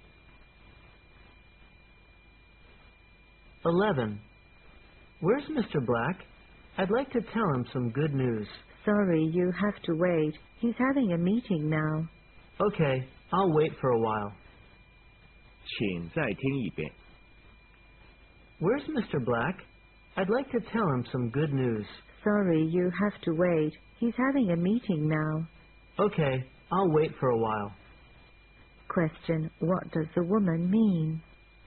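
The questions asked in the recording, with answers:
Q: What does the woman mean?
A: Mr. Black is having a meeting, so the man has to wait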